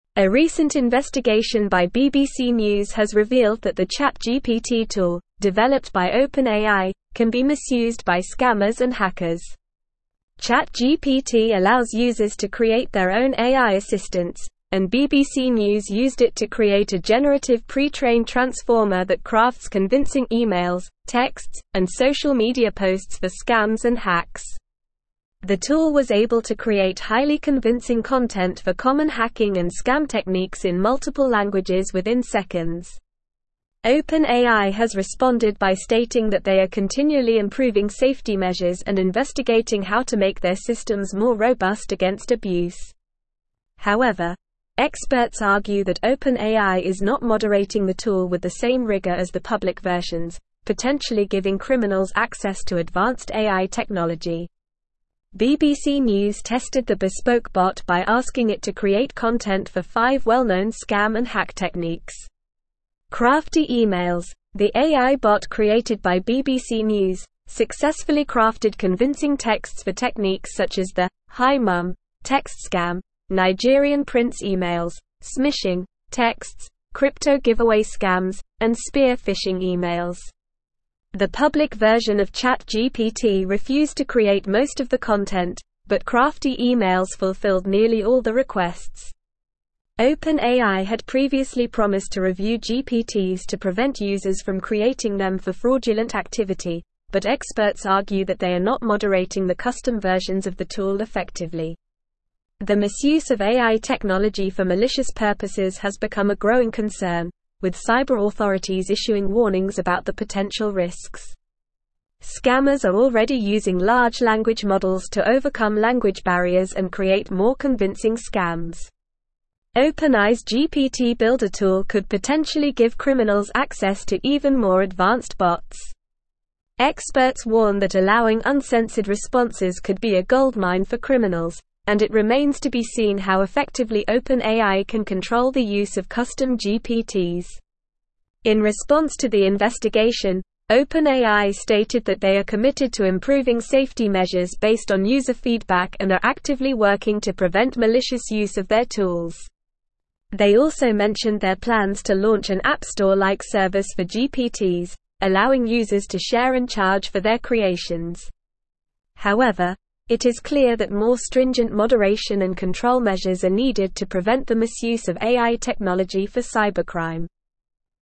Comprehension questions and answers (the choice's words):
True or False Questions:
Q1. BBC News tested the bespoke bot by asking it to create content for five well-known scam and hack techniques, and it failed to craft convincing texts for any of them.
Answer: False

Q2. OpenAI had previously promised to review GPTs to prevent users from creating them for fraudulent activity, and experts argue that they are moderating the custom versions effectively.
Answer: False

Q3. OpenAI is committed to improving safety measures and actively working to prevent malicious use of their tools, but more stringent moderation and control measures are needed.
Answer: True

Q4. The misuse of AI technology for malicious purposes is not a growing concern, with cyber authorities issuing no warnings about the potential risks.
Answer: False

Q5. The ChatGPT tool developed by OpenAI cannot be misused by scammers and hackers.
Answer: False

Multiple Choice Questions:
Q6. What is the purpose of the ChatGPT tool developed by OpenAI?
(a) To investigate scams and hacks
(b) To moderate online content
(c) To create AI assistants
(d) To improve safety measures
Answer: To create AI assistants

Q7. How did BBC News use the ChatGPT tool?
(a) To create a generative pre-trained transformer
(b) To develop their own AI assistants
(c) To investigate cyber authorities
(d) To moderate scam and hack techniques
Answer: To create a generative pre-trained transformer

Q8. What did the investigation by BBC News reveal about the ChatGPT tool?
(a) It is highly effective at preventing fraud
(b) It can be misused by scammers and hackers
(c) It is only available in one language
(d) It is not compatible with social media platforms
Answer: It can be misused by scammers and hackers

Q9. How did OpenAI respond to the investigation?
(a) By discontinuing the ChatGPT tool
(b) By launching an App Store-like service for GPTs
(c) By moderating the tool with the same rigor as the public versions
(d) By improving safety measures and investigating abuse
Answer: By improving safety measures and investigating abuse

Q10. What did Crafty Emails, the AI bot created by BBC News, successfully craft?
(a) Safety measures for AI technology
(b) Convincing texts for scam and hack techniques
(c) Public versions of ChatGPT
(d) Fraudulent activity prevention techniques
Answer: Convincing texts for scam and hack techniques

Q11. What concern has become a growing issue regarding AI technology?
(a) Lack of language models for scams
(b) Cyber authorities issuing warnings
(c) Misuse for malicious purposes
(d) OpenAI's GPT Builder tool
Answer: Misuse for malicious purposes

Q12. What do experts warn about allowing uncensored responses with AI technology?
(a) It could be a goldmine for criminals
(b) It could prevent fraudulent activity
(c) It could improve safety measures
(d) It could lead to more advanced bots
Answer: It could be a goldmine for criminals

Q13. What do experts argue about OpenAI's moderation of the custom versions of the ChatGPT tool?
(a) It is highly rigorous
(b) It prevents cybercrime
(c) It is only available in multiple languages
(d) It is not effective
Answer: It is not effective

Listen and Fill in the Gaps:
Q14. A recent (1)______ by BBC News has revealed that the ChatGPT tool, developed by OpenAI, can be misused by scammers and hackers.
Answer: investigation

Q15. ChatGPT allows users to create their own AI assistants, and BBC News used it to create a generative pre-trained transformer that crafts convincing emails, texts, and social media (2)______ for scams and hacks.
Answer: posts

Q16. The tool was able to create highly convincing content for common hacking and scam techniques in (3)______ languages within seconds.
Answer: multiple

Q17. OpenAI has responded by stating that they are continually improving safety measures and (4)______ how to make their systems more robust against abuse.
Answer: investigating

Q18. However, experts (5)______ that OpenAI is not moderating the tool with the same rigor as the public versions, potentially giving criminals access to (6)______ AI technology.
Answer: argue

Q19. However, experts (5)______ that OpenAI is not moderating the tool with the same rigor as the public versions, potentially giving criminals access to (6)______ AI technology.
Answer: advanced

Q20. BBC News tested the bespoke bot by asking it to (7)______ content for five well-known scam and hack techniques.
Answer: create

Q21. Crafty Emails, the AI bot created by BBC News, successfully crafted (8)______ texts for techniques such as the "Hi Mum" text scam, Nigerian-prince emails, "smishing" texts, crypto-giveaway scams, and spear-phishing emails.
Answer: convincing

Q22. OpenAI had previously promised to review GPTs to prevent users from creating them for (9)______ activity, but experts argue that they are not moderating the custom versions of the tool effectively.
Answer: fraudulent

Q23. The misuse of AI technology for malicious purposes has become a growing concern, with cyber authorities issuing warnings about the potential (10)______.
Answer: risks

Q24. Scammers are already using large language models to (11)______ language barriers and create more convincing scams.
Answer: overcome

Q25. OpenAI's GPT Builder tool could potentially give criminals (12)______ to even more advanced bots.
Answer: access

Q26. Experts warn that allowing uncensored responses could be a goldmine for criminals, and it remains to be seen how effectively OpenAI can control the use of (13)______ GPTs.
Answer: custom

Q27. In response to the investigation, OpenAI stated that they are committed to improving safety measures based on user feedback and are actively working to prevent (14)______ use of their tools.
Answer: malicious

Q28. They also mentioned their plans to launch an App Store-like service for GPTs, (15)______ users to share and charge for their creations.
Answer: allowing

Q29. However, it is (16)______ that more stringent moderation and control measures are needed to prevent the misuse of AI technology for cybercrime.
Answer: clear

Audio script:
A recent investigation by BBC News has revealed that the ChatGPT tool, developed by OpenAI, can be misused by scammers and hackers. ChatGPT allows users to create their own AI assistants, and BBC News used it to create a generative pre-trained transformer that crafts convincing emails, texts, and social media posts for scams and hacks. The tool was able to create highly convincing content for common hacking and scam techniques in multiple languages within seconds. OpenAI has responded by stating that they are continually improving safety measures and investigating how to make their systems more robust against abuse. However, experts argue that OpenAI is not moderating the tool with the same rigor as the public versions, potentially giving criminals access to advanced AI technology.
BBC News tested the bespoke bot by asking it to create content for five well-known scam and hack techniques. Crafty Emails, the AI bot created by BBC News, successfully crafted convincing texts for techniques such as the "Hi Mum" text scam, Nigerian-prince emails, "smishing" texts, crypto-giveaway scams, and spear-phishing emails. The public version of ChatGPT refused to create most of the content, but Crafty Emails fulfilled nearly all the requests. OpenAI had previously promised to review GPTs to prevent users from creating them for fraudulent activity, but experts argue that they are not moderating the custom versions of the tool effectively.
The misuse of AI technology for malicious purposes has become a growing concern, with cyber authorities issuing warnings about the potential risks. Scammers are already using large language models to overcome language barriers and create more convincing scams. OpenAI's GPT Builder tool could potentially give criminals access to even more advanced bots. Experts warn that allowing uncensored responses could be a goldmine for criminals, and it remains to be seen how effectively OpenAI can control the use of custom GPTs.
In response to the investigation, OpenAI stated that they are committed to improving safety measures based on user feedback and are actively working to prevent malicious use of their tools. They also mentioned their plans to launch an App Store-like service for GPTs, allowing users to share and charge for their creations. However, it is clear that more stringent moderation and control measures are needed to prevent the misuse of AI technology for cybercrime.

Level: Level 4